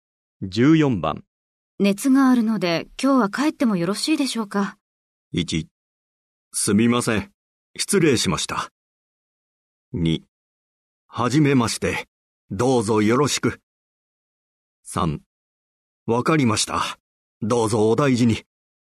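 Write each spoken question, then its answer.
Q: 熱があるので今日は帰ってもよろしいでしょうか。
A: 3: わかりました。どうぞお大事に。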